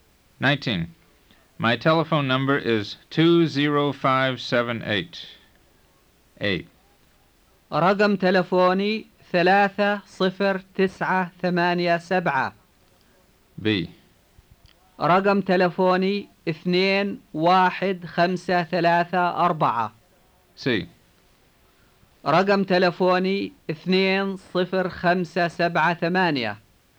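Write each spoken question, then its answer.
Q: My telephone number is 20578.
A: C: رقم تلفوني 20578.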